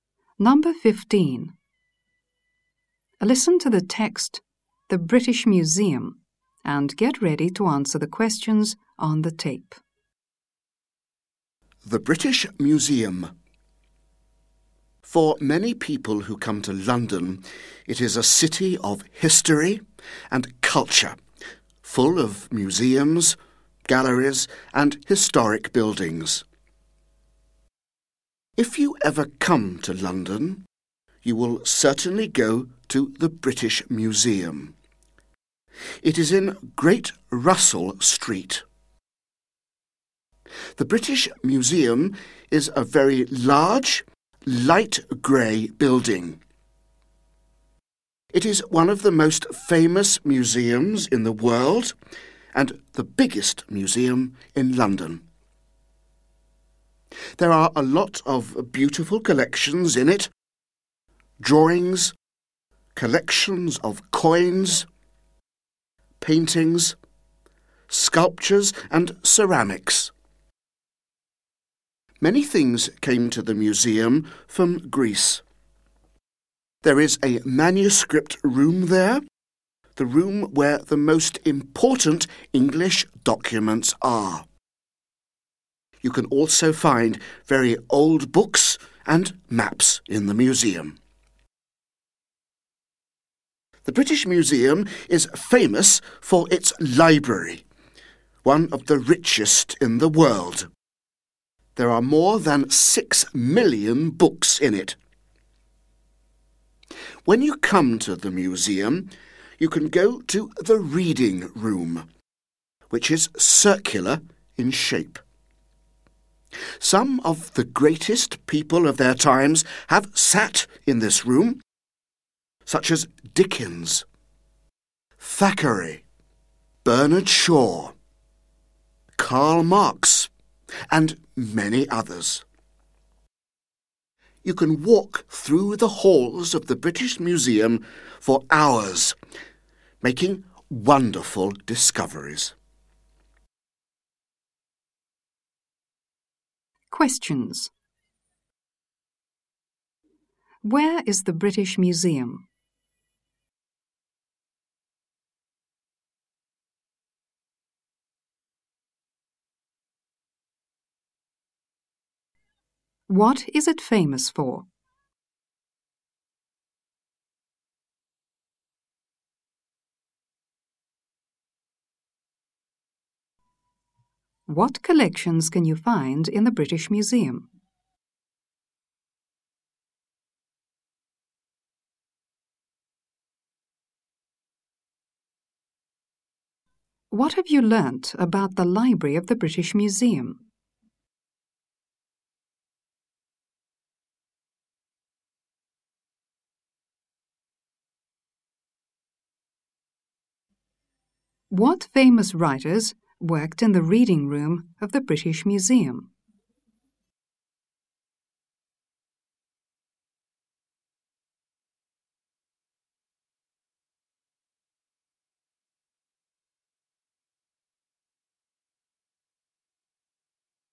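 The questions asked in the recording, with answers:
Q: Where is the British Museum?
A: In Great Russell Street, London

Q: What is it famous for?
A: Its library, one of the richest in the world

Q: What collections can you find in the British Museum?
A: Drawings, coins, paintings, sculptures and ceramics

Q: What have you learnt about the library of the British Museum?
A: It is one of the richest in the world, with more than 6 million books and a circular reading room

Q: What famous writers worked in the reading room of the British Museum?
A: Dickens, Thackeray and Bernard Shaw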